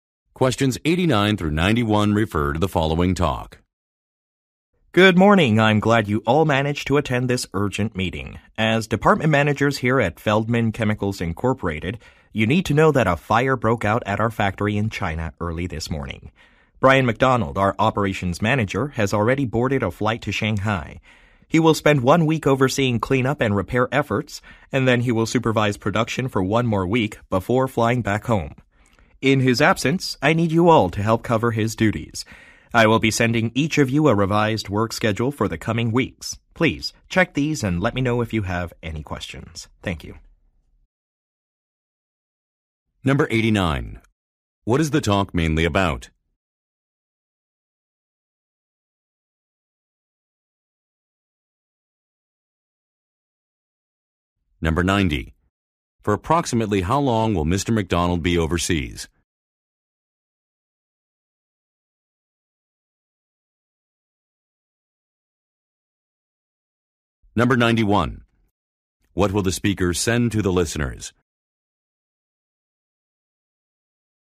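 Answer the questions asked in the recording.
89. A fire at the company's factory in China
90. Two weeks
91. A revised work schedule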